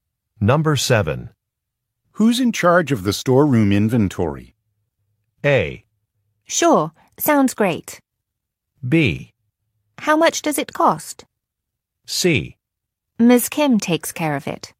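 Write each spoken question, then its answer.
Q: Who's in charge of the storeroom inventory?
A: C: Ms. Kim takes care of it.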